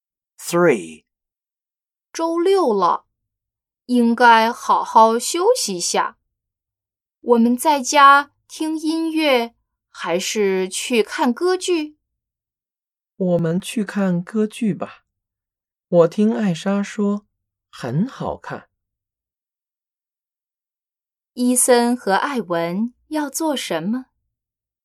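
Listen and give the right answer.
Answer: 去看歌剧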